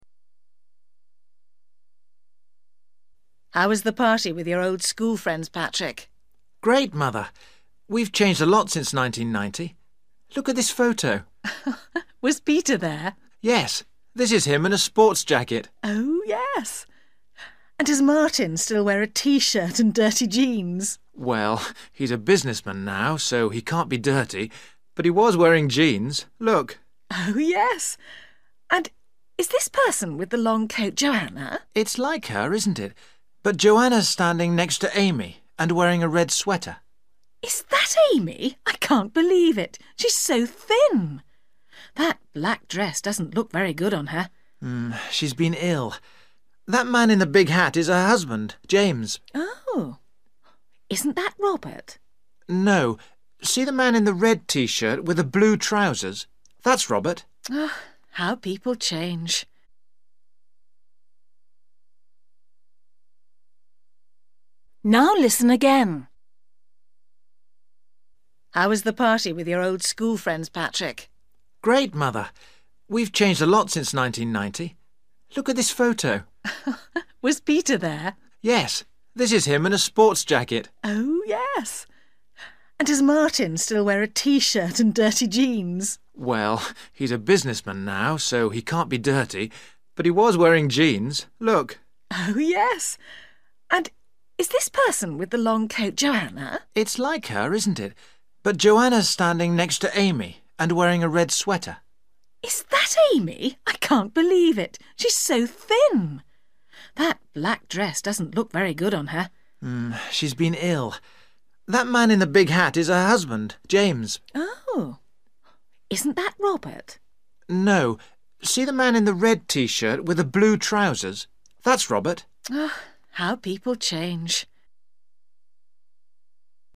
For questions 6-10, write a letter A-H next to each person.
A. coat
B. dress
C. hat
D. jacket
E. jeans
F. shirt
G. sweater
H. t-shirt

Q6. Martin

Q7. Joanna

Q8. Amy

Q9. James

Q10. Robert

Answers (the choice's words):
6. jeans
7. sweater
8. dress
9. hat
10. t-shirt

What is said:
Mother: How was the party with your old school friends, Patrick?
Patrick: Great, Mother. We've changed a lot since 1990. Look at this photo.
Mother: Was Peter there?
Patrick: Yes, this is him in a sports jacket.
Mother: Oh, yes. And does Martin still wear a t-shirt and dirty jeans?
Patrick: Well, he's a businessman row, so he can't be dirty. But he was wearing jeans. Look.
Mother: Oh, yes. And is this person with the long coat Joanna?
Patrick: It's like her, isn't it, but Joanna's standing next to Amy and wearing a red sweater.
Mother: Is that Amy? I can't believe it. She's so thin! That black dress doesn't look very good on her.
Patrick: She's been ill. That man in the big hat is her husband, James.
Mother: Oh? Isn't that Robert?
Patrick: No, see the man in the red t-shirt with the blue trousers? That's Robert.
Mother: How people change!

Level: A2